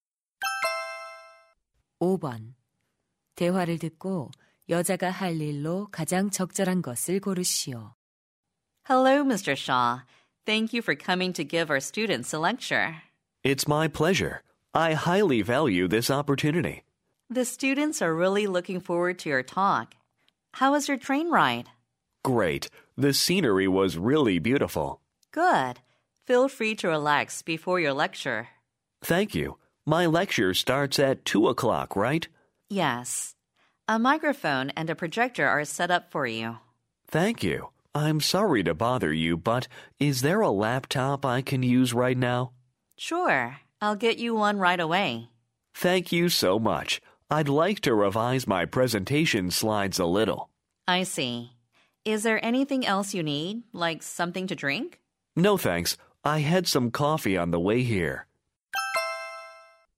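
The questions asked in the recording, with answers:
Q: 대화를 듣고 여자가 할 일로 가장 적절한 것을 고르시오.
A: 노트북 가져다주기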